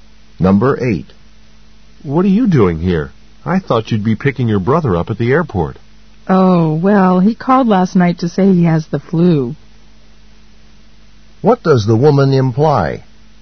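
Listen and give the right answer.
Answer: Her brother isn't coming because he has the flu.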